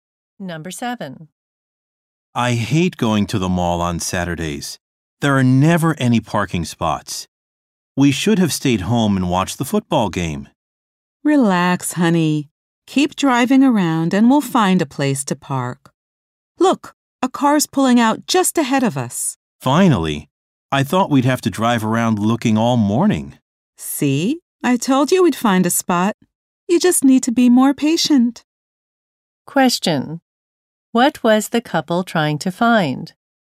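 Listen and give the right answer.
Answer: A parking spot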